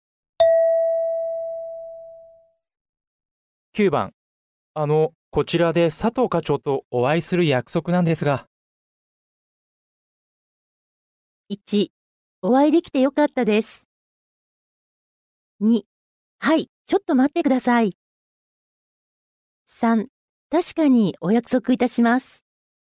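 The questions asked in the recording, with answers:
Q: こちらで佐藤課長とお会いする約束なんですが。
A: 2: はい、ちょっと待ってください。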